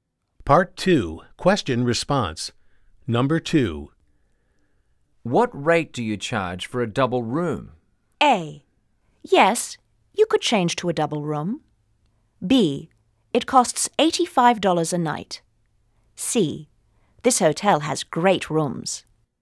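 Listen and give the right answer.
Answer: B: It costs $85 a night.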